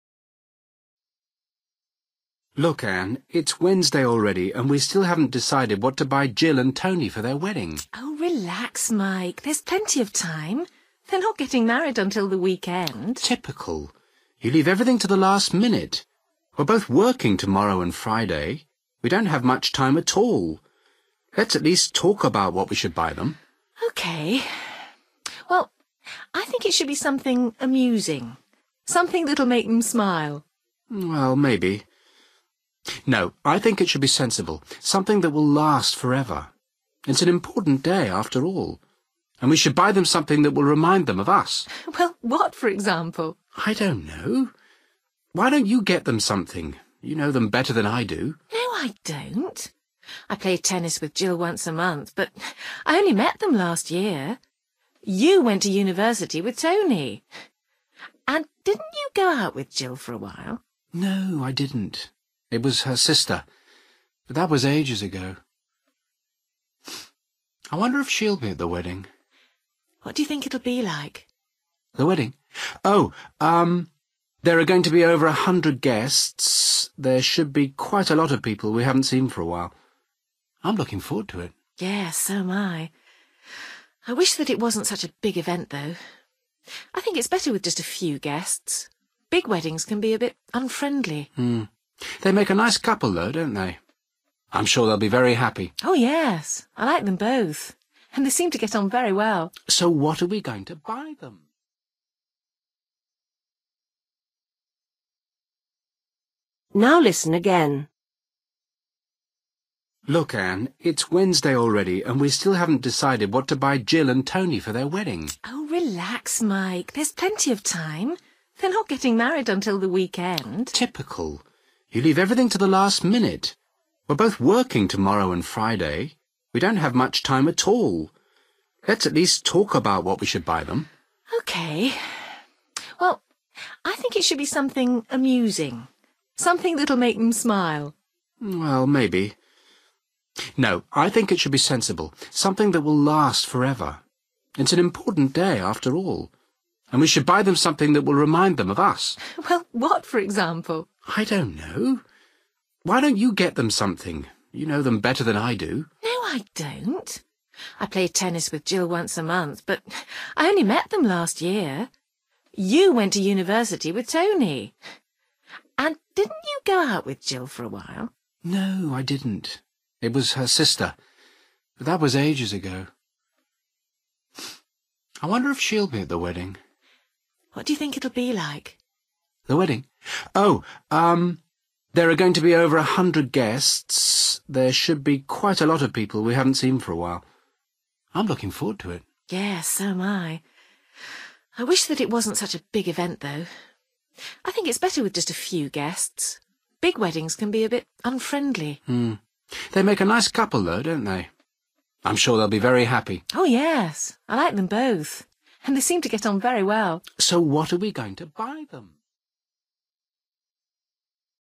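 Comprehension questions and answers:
Decide if each sentence is correct or incorrect. If it is correct, choose YES. If it is not correct, choose NO.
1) Mike likes to plan ahead more than Ann does.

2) Ann thinks they should buy a useful present.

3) Mike thinks he should choose the present.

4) Mike has known Tony the longest.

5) Mike thinks he will enjoy the wedding.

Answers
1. YES
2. NO
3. NO
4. YES
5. YES

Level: Luyện nghe trình độ B1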